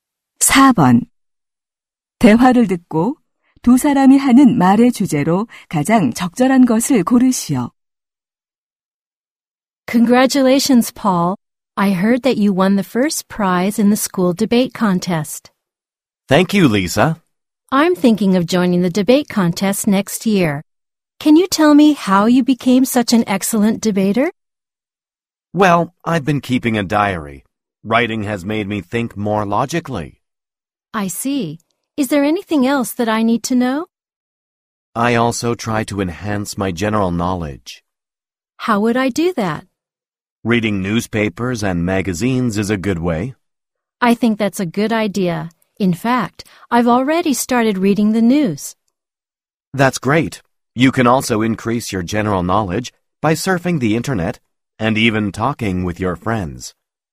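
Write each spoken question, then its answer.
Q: 대화를 듣고 두 사람이 하는 말의 주제로 가장 적절한 것을 고르시오.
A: 토론 실력을 향상시키는 방법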